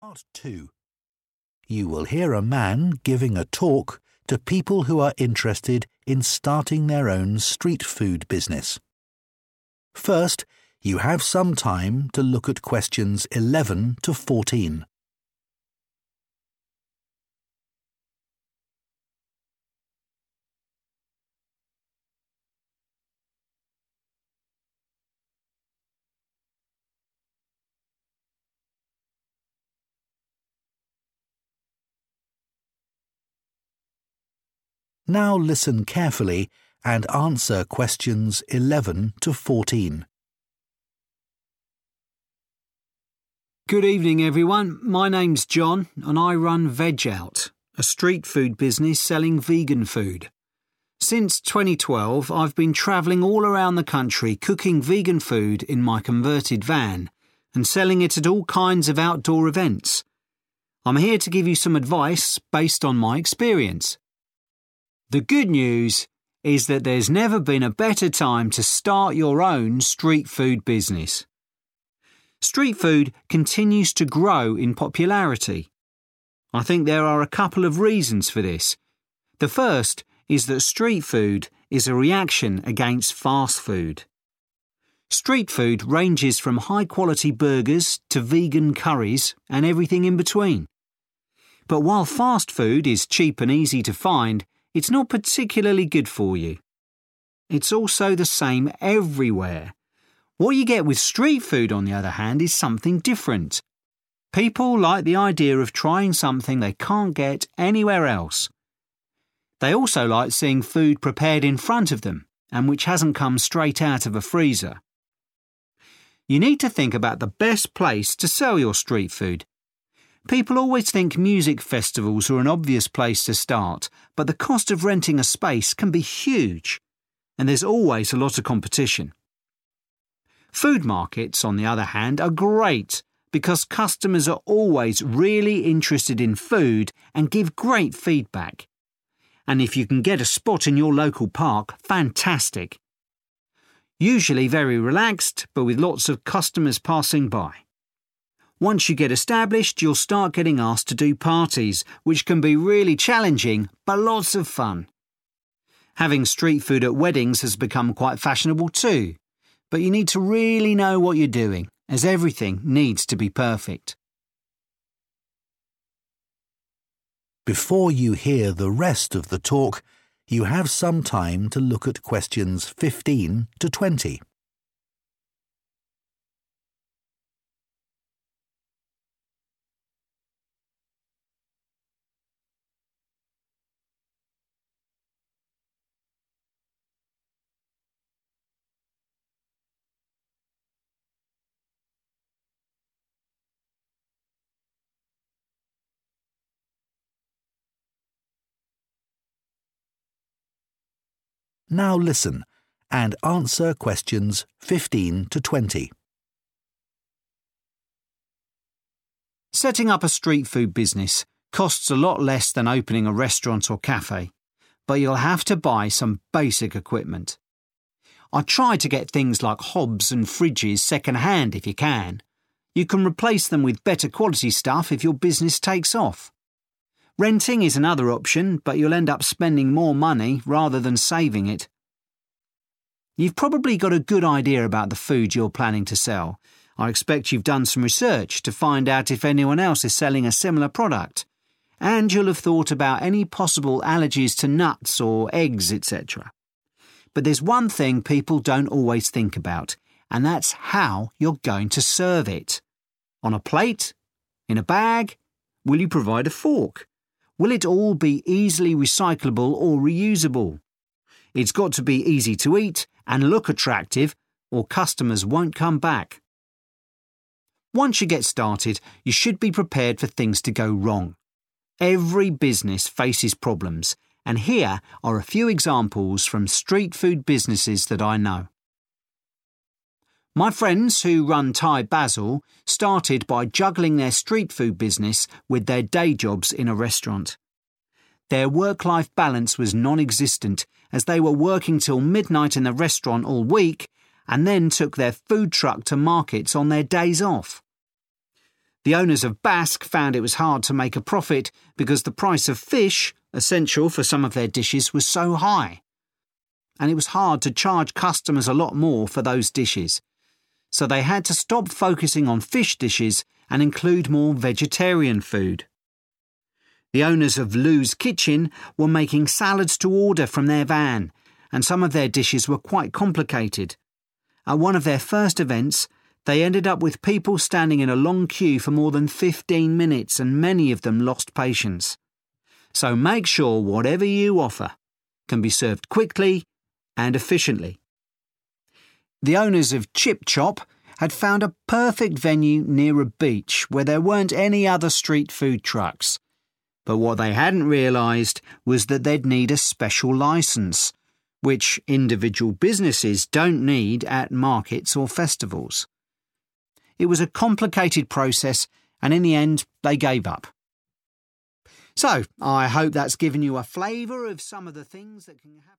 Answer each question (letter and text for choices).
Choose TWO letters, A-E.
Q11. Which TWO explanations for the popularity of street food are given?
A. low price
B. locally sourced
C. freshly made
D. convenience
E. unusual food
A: C. freshly made

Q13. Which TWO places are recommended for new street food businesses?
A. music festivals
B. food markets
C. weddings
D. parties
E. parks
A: B. food markets

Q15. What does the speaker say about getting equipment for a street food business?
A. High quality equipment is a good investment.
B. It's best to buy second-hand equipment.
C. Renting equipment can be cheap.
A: B. It's best to buy second-hand equipment.

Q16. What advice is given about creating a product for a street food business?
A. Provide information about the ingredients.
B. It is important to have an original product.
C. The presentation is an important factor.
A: C. The presentation is an important factor.

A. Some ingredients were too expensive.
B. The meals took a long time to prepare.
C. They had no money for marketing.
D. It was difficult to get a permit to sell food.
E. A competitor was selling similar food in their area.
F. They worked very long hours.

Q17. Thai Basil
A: F. They worked very long hours.

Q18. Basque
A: A. Some ingredients were too expensive.

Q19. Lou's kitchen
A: B. The meals took a long time to prepare.

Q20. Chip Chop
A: D. It was difficult to get a permit to sell food.

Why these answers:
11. The correct answer is based on Jon's speech about why street food is doing well. He mentions that customers like to try food that is different from what is normally available. He also notes that people enjoy watching their food being cooked instead of getting food that was kept in a freezer. These points match 'unusual food' and 'freshly made'.
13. The correct answer is B and E because the speaker specifically calls food markets "great" and describes getting a spot in a local park as "fantastic." He notes that food markets provide helpful feedback from customers, and parks offer a relaxed environment with many people walking by. In contrast, he says music festivals are expensive and weddings require a lot of experience.
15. The correct answer is B because the speaker specifically suggests buying things like hobs and fridges 'second hand' if possible. He explains that this is a way to manage costs when starting out. He also mentions that while you can get better quality items later, and renting is an option, renting actually costs more money in the end, making buying used equipment the preferred choice.
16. The correct answer is C because the speaker focuses on the details of how the food is served to the customer. He mentions that business owners need to decide if they will use a plate or a bag and whether they will provide a fork. He specifically states that the food must "look attractive," which is another way of saying the presentation must be good. If it does not look good, people will not come back. Keywords to notice here are "how you're going to serve it" and "look attractive."
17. The correct answer is F because the speaker mentions that the owners of Thai Basil struggled with their "work-life balance." They were doing two things at the same time: working at a restaurant until midnight during the week and running their food truck on their days off. This meant they were working almost all the time with no rest. The term "juggling" shows they were trying to do two difficult tasks at once, and having a "non-existent" work-life balance means they had no time for a personal life because they were busy working.
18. The correct answer is A because the speaker mentions that the owners of the business called 'Basque' struggled to make a profit. This was specifically because the price of fish, which they needed for their meals, was very high. In this context, 'high price' is a synonym for 'expensive' and 'fish' is a type of 'ingredient'.
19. The correct answer is B because the transcript describes Lou's kitchen making dishes that were "complicated," which resulted in people waiting in a "long queue" for over 15 minutes. This prolonged wait time is the "long time to prepare" mentioned in choice B. To avoid this, the speaker suggests that street food should be able to be "served quickly."
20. The correct answer is D because the speaker explains that Chip Chop found a great location but did not realize it required a 'special licence.' In this context, a 'licence' and a 'permit' are the same thing. Because the process to get this license was 'complicated,' they chose to stop trying.

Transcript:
Good evening everyone. My name's Jon and I run Veg Out, a street food business selling vegan food. Since 2012 I've been travelling all around the country cooking vegan food in my converted van and selling it at all kinds of outdoor events. I'm here to give you some advice based on my experience.
The good news is that there's never been a better time to start your own street food business. Street food continues to grow in popularity. I think there are a couple of reasons for this. The first is that street food is a reaction against fast food. Street food ranges from high quality burgers to vegan curries and everything in between. But while fast food is cheap and easy to find, it's not particularly good for you. It's also the same everywhere. What you get with street food on the other hand is something different. People like the idea of trying something they can't get anywhere else. They also like seeing food prepared in front of them and which hasn't come straight out of a freezer.
You need to think about the best place to sell your street food. People always think music festivals are an obvious place to start but the cost of renting a space can be huge. And there's always a lot of competition. Food markets, on the other hand, are great because customers are always really interested in food and give great feedback. And if you can get a spot in your local park – fantastic. Usually very relaxed but with lots of customers passing by. Once you get established you'll start getting asked to do parties – which can be really challenging but lots of fun. Having street food at weddings has become quite fashionable too – but you need to really know what you're doing as everything needs to be perfect.
Setting up a street food business costs a lot less than opening a restaurant or café but you'll have to buy some basic equipment. I'd try to get things like hobs and fridges second hand if you can. You can replace them with better quality stuff if your business takes off. Renting is another option but you'll end up spending more money rather than saving it.
You've probably got a good idea about the food you're planning to sell. I expect you've done some research to find out if anyone else is selling a similar product. And you'll have thought about any possible allergies to nuts or eggs etc. But there's one thing people don't always think about and that's how you're going to serve it. On a plate? In a bag? Will you provide a fork? Will it all be easily recyclable or reusable? It's got to be easy to eat and look attractive or customers won't come back.
Once you get started, you should be prepared for things to go wrong. Every business faces problems and here are a few examples from street food businesses that I know.
My friends who run Thai Basil started by juggling their street food business with their day jobs in a restaurant. Their work-life balance was non-existent as they were working til midnight in the restaurant all week and then took their food truck to markets on their days off.
The owners of Basque found it was hard to make a profit because the price of fish – essential for some of their dishes – was so high. And it was hard to charge customers a lot more for those dishes. So they had to stop focussing on fish dishes and include more vegetarian food.
The owners of Lou's kitchen were making salads to order from their van and some of their dishes were quite complicated. At one of their first events they ended up with people standing in a long queue for more than 15 minutes – and many of them lost patience. So make sure whatever you offer can be served quickly and efficiently.
The owners of Chip Chop had found a perfect venue near a beach where there weren't any other street food trucks. But what they hadn't realised was that they'd need a special licence – which individual businesses don't need at markets or festivals. It was a complicated process and in the end they gave up.
So I hope that's given you a flavour of ....